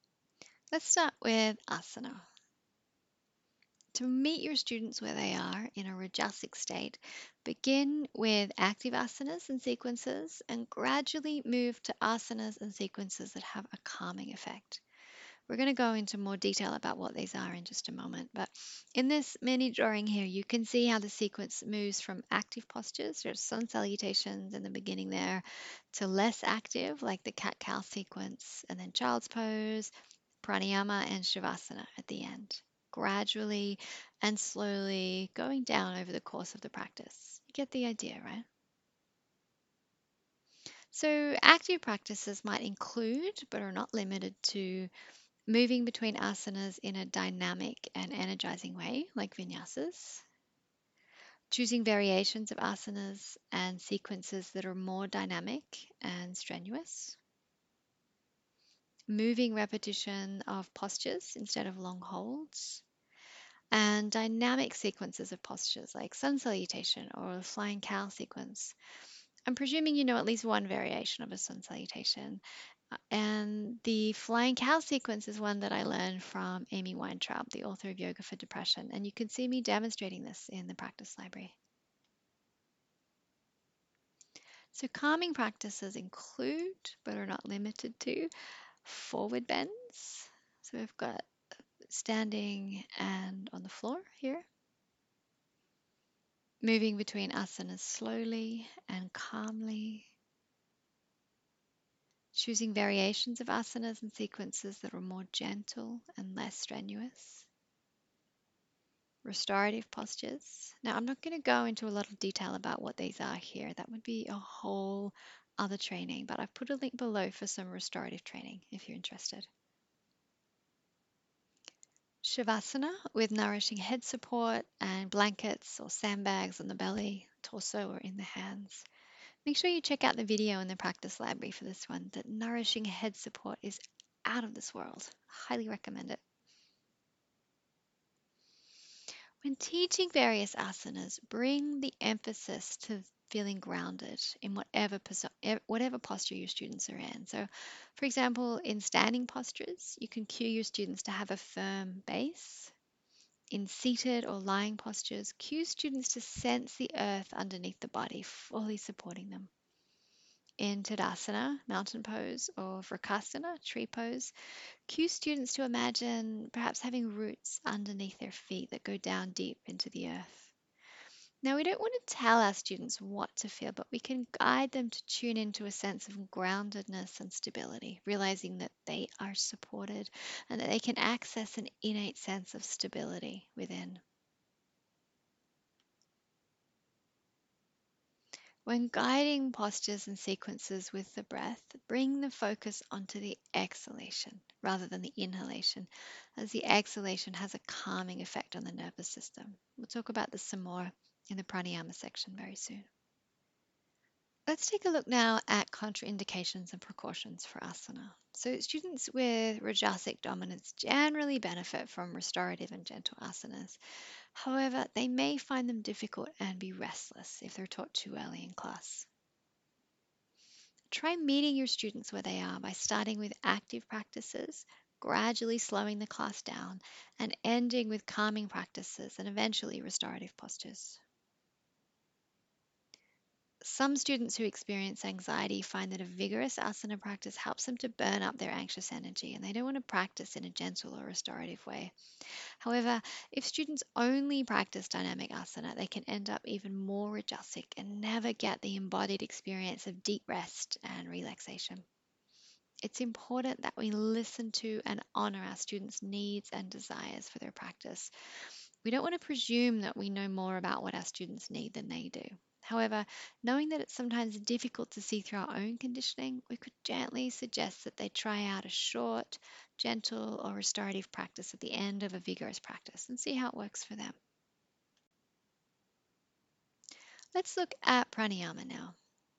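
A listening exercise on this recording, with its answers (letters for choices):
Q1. When teaching āsana, what can be helpful in reducing rajas?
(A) Beginning with active āsanas and sequences, and gradually moving to āsanas and sequences that have a calming effect.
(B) Beginning with gentle and calming āsanas and sequences and gradually moving to āsanas and sequences that have an energising effect.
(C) Emphasising a feeling of groundedness.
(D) 1 and 3.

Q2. Some students who experience anxiety find that a vigorous āsana practice helps them to burn up their anxious energy, and they don't want to practise in a gentle or restorative way. If you have a student like this in your class, what could you do?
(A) Insist that they do a series of restorative yoga postures and a long savāsana at the end of class, as the research tells us that this is important to down-regulate the nervous system and reduce anxiety.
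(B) Gently suggest that they try out a short, gentle or restorative practice at the end of class and see how it works for them, but trust that they know what is best for them, and support them in this decision.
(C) Never teach a vigorous āsana class to students experiencing anxiety.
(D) None of the above.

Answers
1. D
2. B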